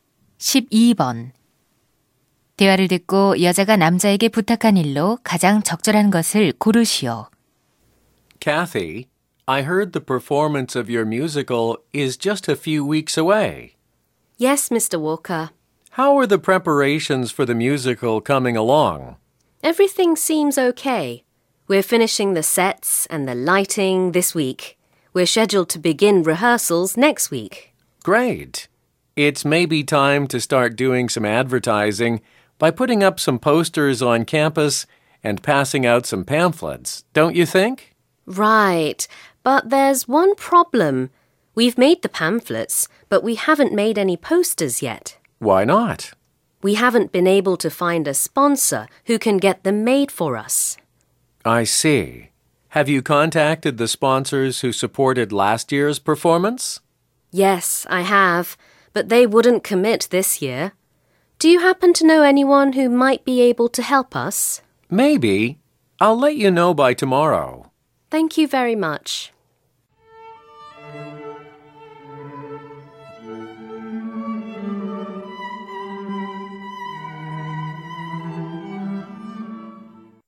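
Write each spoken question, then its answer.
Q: 대화를 듣고 여자가 남자에게 부탁한 일로 가장 적절한 것을 고르시오.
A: 포스터 제작을 도와줄 후원자 알아봐 주기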